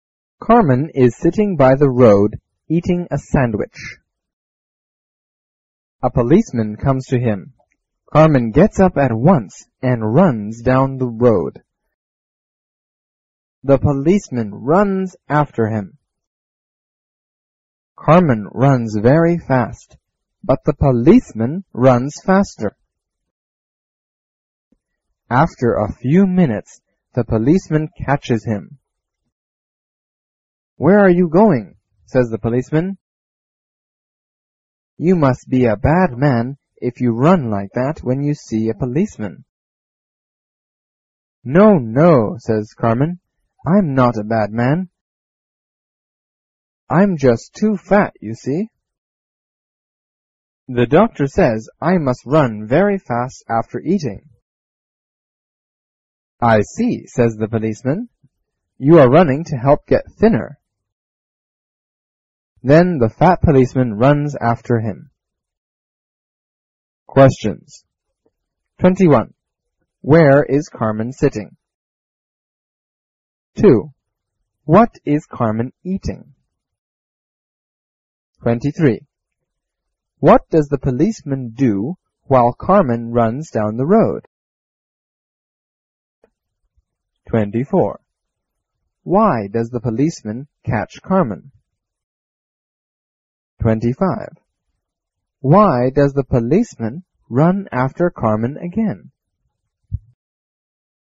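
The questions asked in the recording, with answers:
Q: Where is Carmen sitting?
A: By the road

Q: What is Carmen eating?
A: A sandwich

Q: What does the policeman do while Carmen runs down the road?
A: He runs after him

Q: Why does the policeman run after Carmen again?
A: He is fat and wants to get thinner too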